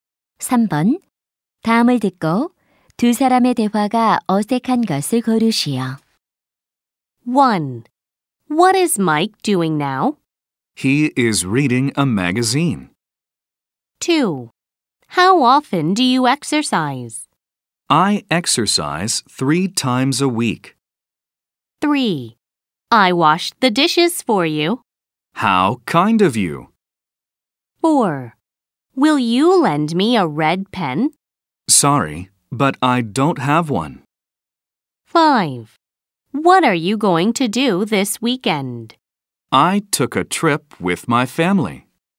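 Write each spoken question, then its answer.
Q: 다음을 듣고 두 사람의 대화가 어색한 것을 고르시오.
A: 5: What are you going to do this weekend? - I took a trip with my family.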